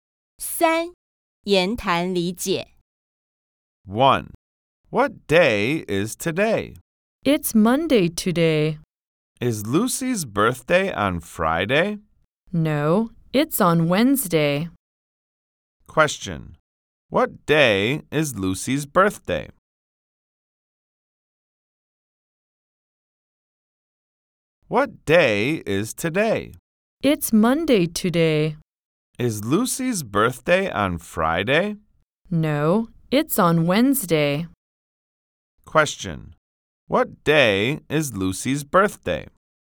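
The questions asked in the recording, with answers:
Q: What day is Lucy's birthday?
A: Wednesday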